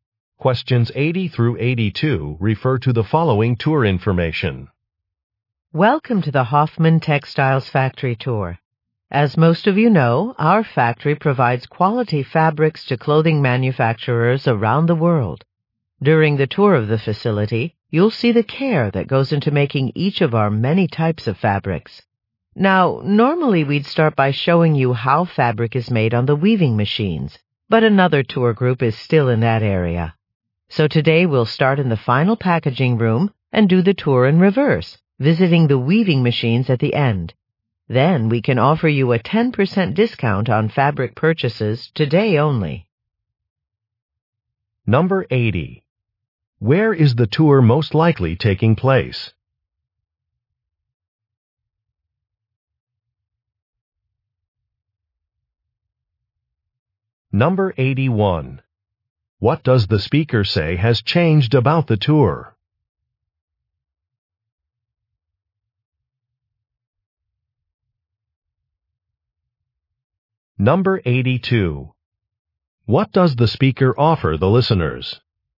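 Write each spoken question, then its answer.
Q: Where is the tour most likely taking place?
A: At a textile factory

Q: What does the speaker say has changed about the tour?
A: It will be done in reverse order

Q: What does the speaker offer the listeners?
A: A 10% discount on fabric purchases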